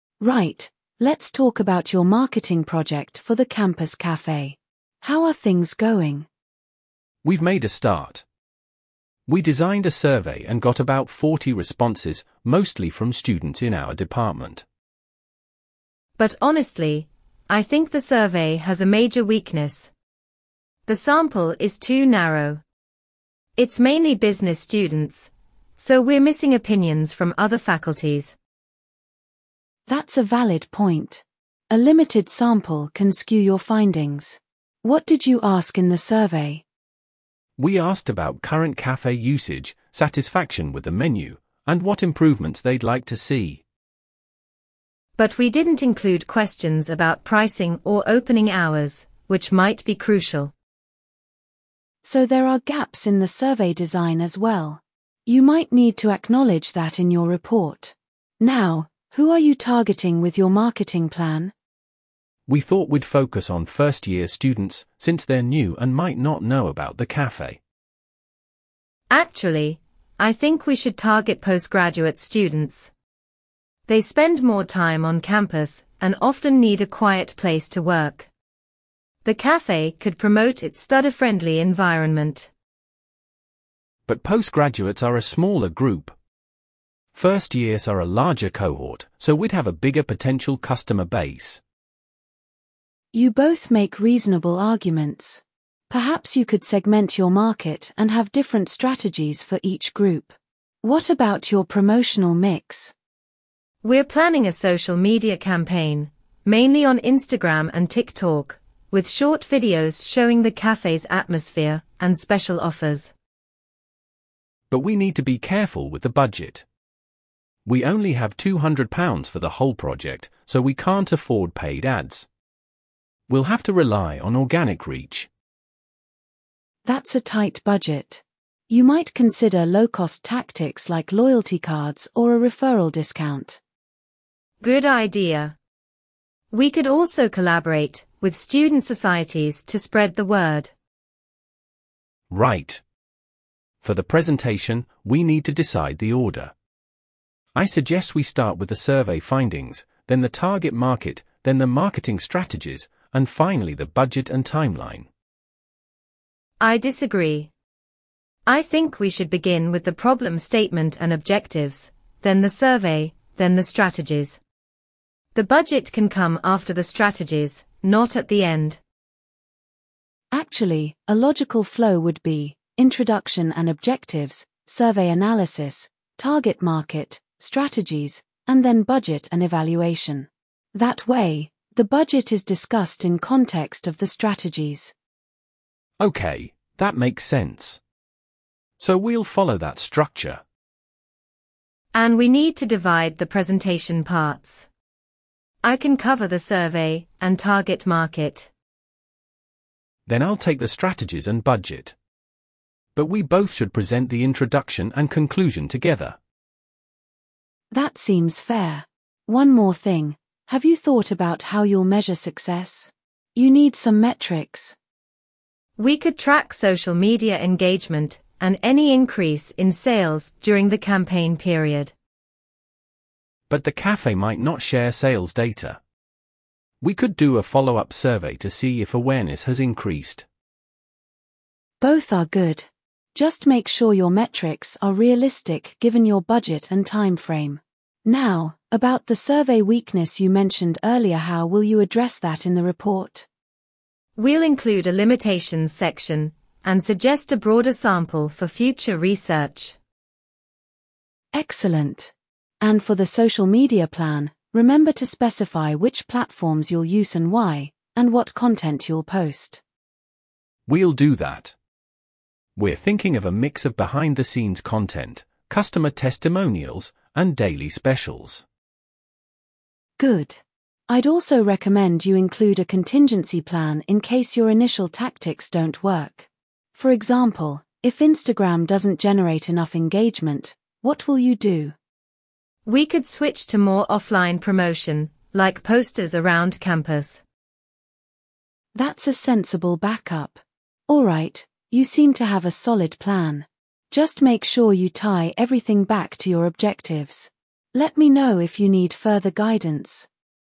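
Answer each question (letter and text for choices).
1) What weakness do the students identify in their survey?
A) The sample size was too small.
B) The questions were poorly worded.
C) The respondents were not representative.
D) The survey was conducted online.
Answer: C) The respondents were not representative.

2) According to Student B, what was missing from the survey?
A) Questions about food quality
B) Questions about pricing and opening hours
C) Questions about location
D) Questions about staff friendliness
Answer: B) Questions about pricing and opening hours

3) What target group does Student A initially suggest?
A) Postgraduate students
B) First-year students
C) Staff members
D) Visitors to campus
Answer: B) First-year students

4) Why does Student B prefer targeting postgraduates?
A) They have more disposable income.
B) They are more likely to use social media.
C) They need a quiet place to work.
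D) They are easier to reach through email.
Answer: C) They need a quiet place to work.

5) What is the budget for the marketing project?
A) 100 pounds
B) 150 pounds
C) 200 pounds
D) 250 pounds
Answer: C) 200 pounds

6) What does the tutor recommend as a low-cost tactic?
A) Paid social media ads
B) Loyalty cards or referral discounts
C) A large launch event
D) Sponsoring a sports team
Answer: B) Loyalty cards or referral discounts

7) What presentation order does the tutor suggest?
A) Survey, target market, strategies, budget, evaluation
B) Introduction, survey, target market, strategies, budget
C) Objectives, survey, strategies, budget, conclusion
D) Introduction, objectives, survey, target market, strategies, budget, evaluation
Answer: D) Introduction, objectives, survey, target market, strategies, budget, evaluation

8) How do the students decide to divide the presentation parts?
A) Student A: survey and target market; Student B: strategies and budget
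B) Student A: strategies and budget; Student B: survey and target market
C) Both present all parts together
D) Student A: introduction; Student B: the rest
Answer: B) Student A: strategies and budget; Student B: survey and target market

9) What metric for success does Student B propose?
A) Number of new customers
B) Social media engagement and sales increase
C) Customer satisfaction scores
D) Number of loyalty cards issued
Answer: B) Social media engagement and sales increase

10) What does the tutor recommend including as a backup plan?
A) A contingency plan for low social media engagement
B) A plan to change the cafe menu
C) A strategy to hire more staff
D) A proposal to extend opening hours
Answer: A) A contingency plan for low social media engagement

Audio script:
Tutor: Right, let's talk about your marketing project for the campus cafe. How are things going?
Student A: We've made a start. 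We designed a survey and got about 40 responses, mostly from students in our department.
Student B: But honestly, I think the survey has a major weakness. The sample is too narrow. It's mainly business students, so we're missing opinions from other faculties.
Tutor: That's a valid point. A limited sample can skew your findings. What did you ask in the survey?
Student A: We asked about current cafe usage, satisfaction with the menu, and what improvements they'd like to see.
Student B: But we didn't include questions about pricing or opening hours, which might be crucial.
Tutor: So there are gaps in the survey design as well. You might need to acknowledge that in your report. Now, who are you targeting with your marketing plan?
Student A: We thought we'd focus on first-year students, since they're new and might not know about the cafe.
Student B: Actually, I think we should target postgraduate students. 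They spend more time on campus and often need a quiet place to work. The cafe could promote its study-friendly environment.
Student A: But postgraduates are a smaller group. First-years are a larger cohort, so we'd have a bigger potential customer base.
Tutor: You both make reasonable arguments. Perhaps you could segment your market and have different strategies for each group. What about your promotional mix?
Student B: We're planning a social media campaign, mainly on Instagram and TikTok, with short videos showing the cafe's atmosphere and special offers.
Student A: But we need to be careful with the budget. We only have 200 pounds for the whole project, so we can't afford paid ads. We'll have to rely on organic reach.
Tutor: That's a tight budget. You might consider low-cost tactics like loyalty cards or a referral discount.
Student B: Good idea. We could also collaborate with student societies to spread the word.
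Student A: Right. For the presentation, we need to decide the order. I suggest we start with the survey findings, then the target market, then the marketing strategies, and finally the budget and timeline.
Student B: I disagree. I think we should begin with the problem statement and objectives, then the survey, then the strategies. The budget can come after the strategies, not at the end.
Tutor: Actually, a logical flow would be: introduction and objectives, survey analysis, target market, strategies, and then budget and evaluation. That way, the budget is discussed in context of the strategies.
Student A: Okay, that makes sense. So we'll follow that structure.
Student B: And we need to divide the presentation parts. I can cover the survey and target market.
Student A: Then I'll take the strategies and budget. But we both should present the introduction and conclusion together.
Tutor: That seems fair. 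One more thing: have you thought about how you'll measure success? You need some metrics.
Student B: We could track social media engagement and any increase in sales during the campaign period.
Student A: But the cafe might not share sales data. We could do a follow-up survey to see if awareness has increased.
Tutor: Both are good. Just make sure your metrics are realistic given your budget and timeframe. Now, about the survey weakness you mentioned earlier-how will you address that in the report?
Student B: We'll include a limitations section and suggest a broader sample for future research.
Tutor: Excellent. And for the social media plan, remember to specify which platforms you'll use and why, and what content you'll post.
Student A: We'll do that. We're thinking of a mix of behind-the-scenes content, customer testimonials, and daily specials.
Tutor: Good. I'd also recommend you include a contingency plan in case your initial tactics don't work. 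For example, if Instagram doesn't generate enough engagement, what will you do?
Student B: We could switch to more offline promotion, like posters around campus.
Tutor: That's a sensible backup. Alright, you seem to have a solid plan. Just make sure you tie everything back to your objectives. Let me know if you need further guidance.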